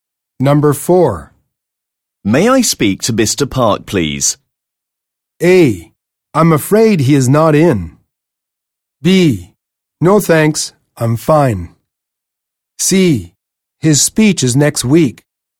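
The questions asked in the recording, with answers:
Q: May I speak to Mr. Park, please?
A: A: I'm afraid he is not in.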